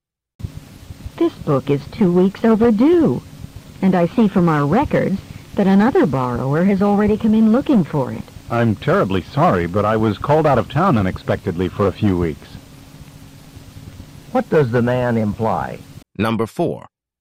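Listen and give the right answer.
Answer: He was out of town unexpectedly, so he couldn't return the book on time.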